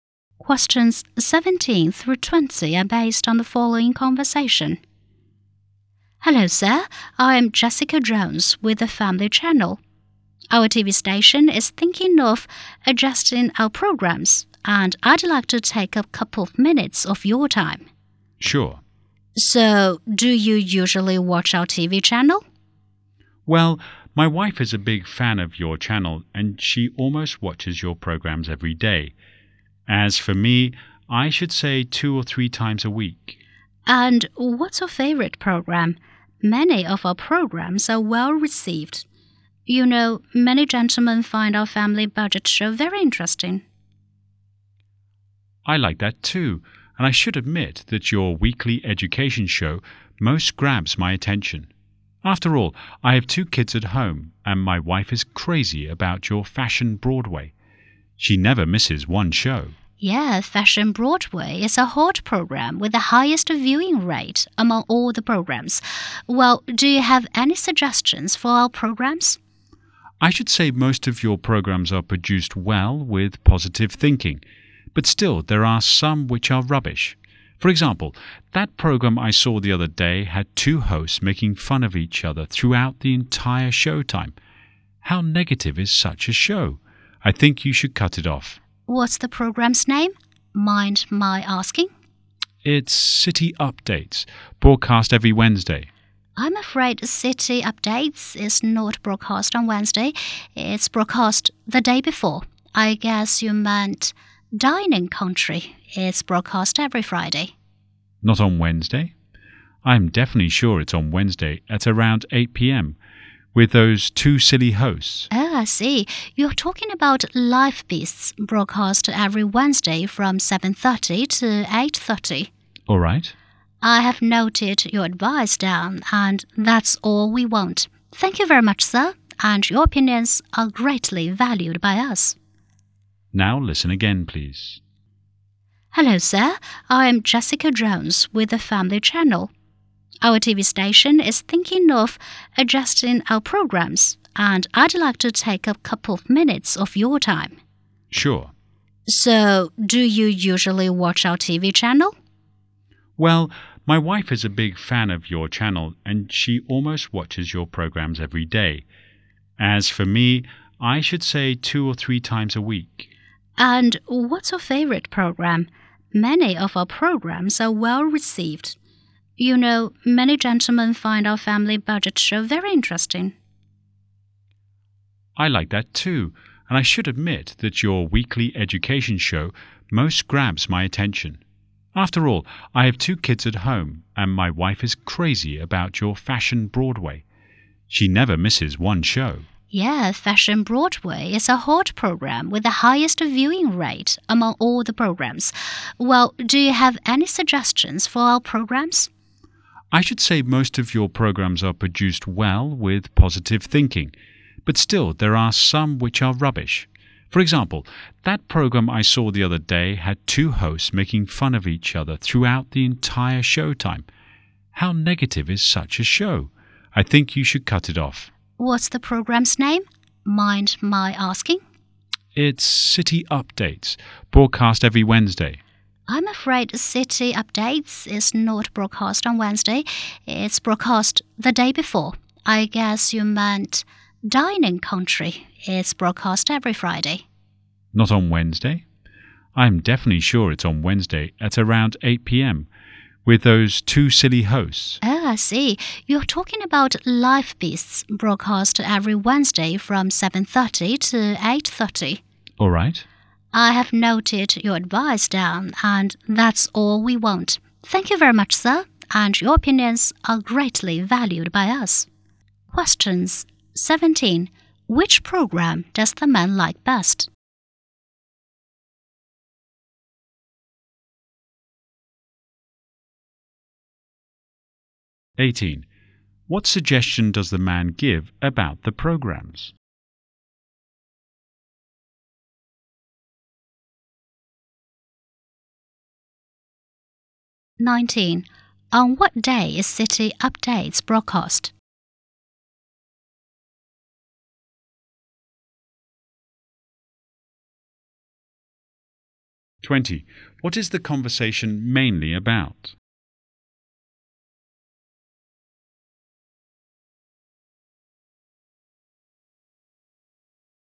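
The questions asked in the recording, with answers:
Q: Which program does the man like best?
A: The weekly education show

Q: What suggestion does the man give about the programs?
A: Cut off the negative show with hosts making fun of each other

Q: On what day is City Updates broadcast?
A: Tuesday

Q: What is the conversation mainly about?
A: A survey of viewers' opinions on TV programs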